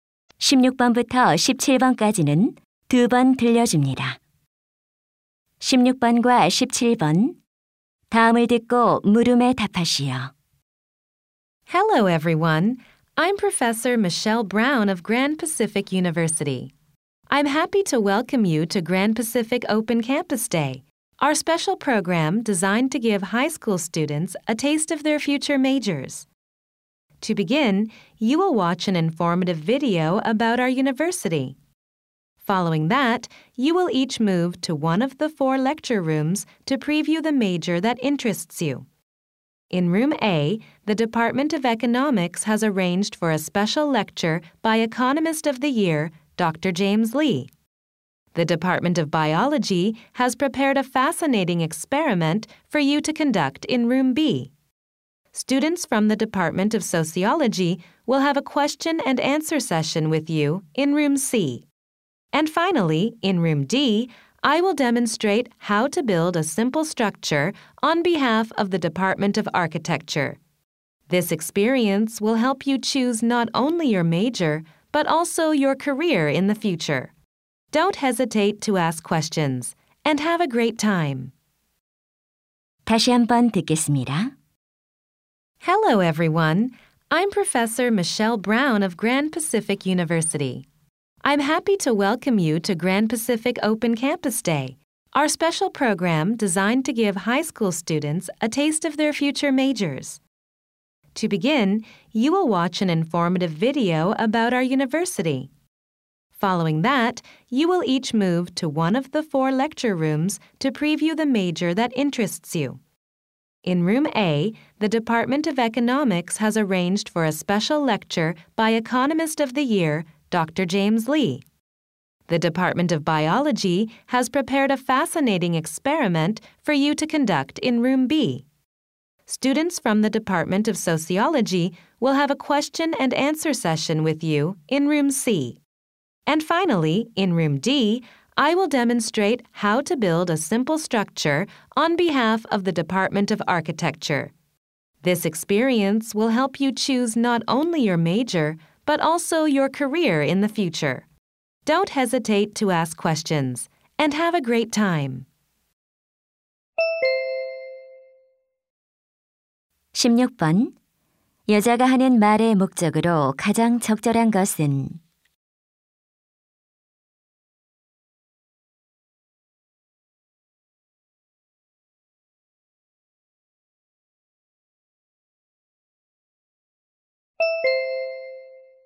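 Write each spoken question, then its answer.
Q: 여자가 하는 말의 목적으로 가장 적절한 것은?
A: 오픈 캠퍼스 데이 프로그램 일정을 안내하려고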